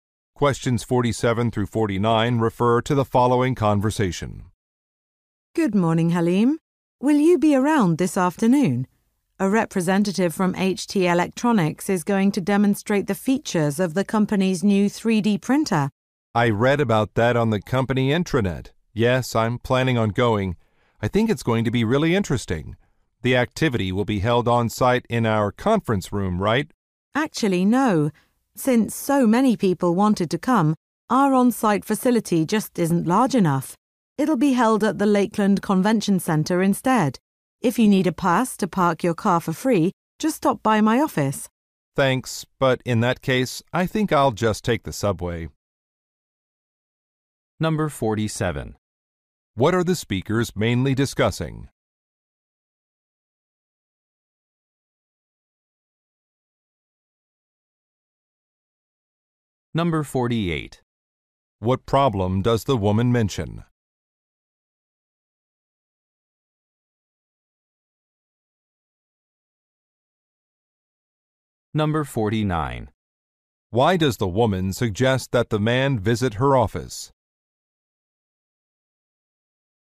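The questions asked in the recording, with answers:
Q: What are the speakers mainly discussing?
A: A demonstration of a new 3D printer

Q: What problem does the woman mention?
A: The on-site room is too small

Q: Why does the woman suggest that the man visit her office?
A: To get a free parking pass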